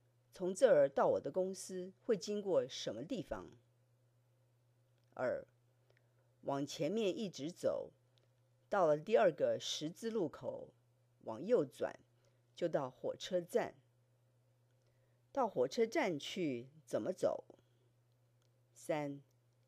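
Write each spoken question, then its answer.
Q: 到火车站去怎么走?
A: 往前一直走,到第二个十字路口往右转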